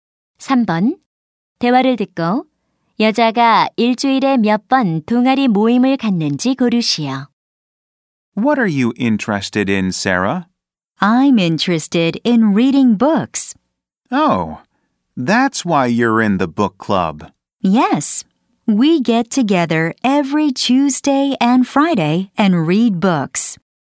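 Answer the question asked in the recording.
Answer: 2번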